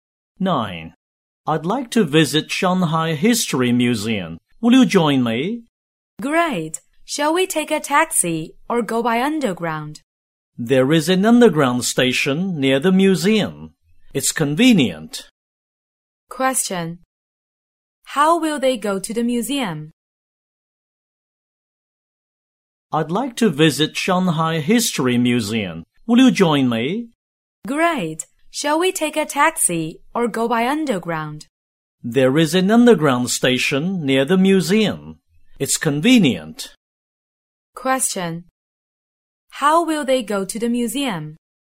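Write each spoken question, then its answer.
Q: How will they go to the museum?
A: By underground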